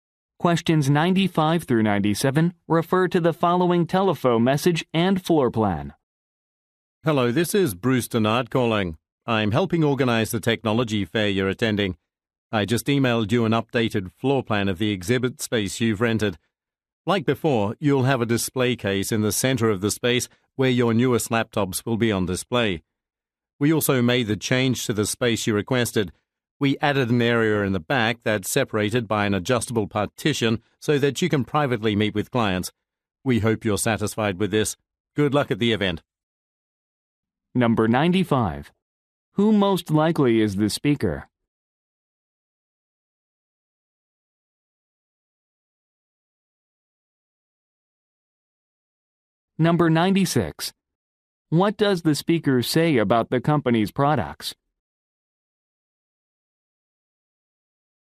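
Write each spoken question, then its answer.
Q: Who most likely is the speaker?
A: An organizer of a technology fair

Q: What does the speaker say about the company's products?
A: Its newest laptops will be displayed in the center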